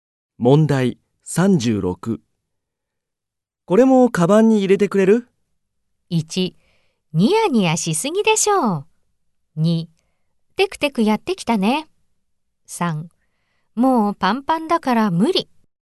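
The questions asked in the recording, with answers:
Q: これもカバンに入れてくれる?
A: 3: もうパンパンだから無理。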